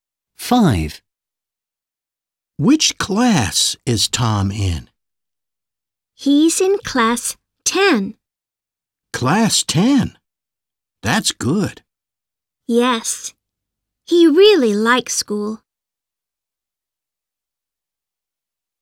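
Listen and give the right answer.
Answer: 10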